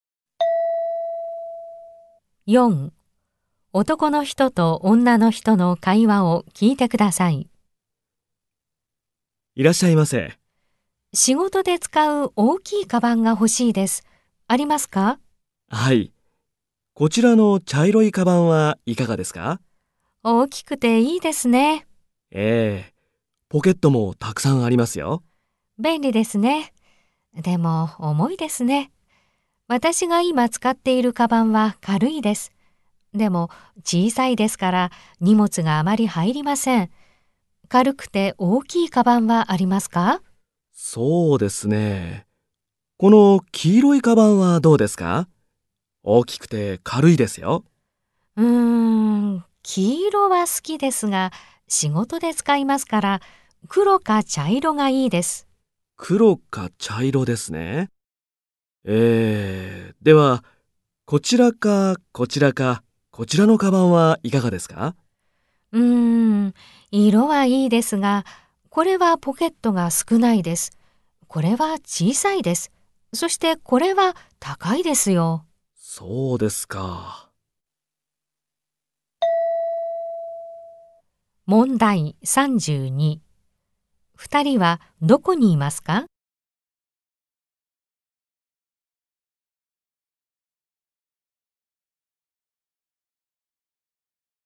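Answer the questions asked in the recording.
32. カバンの店
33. 軽くて小さいカバン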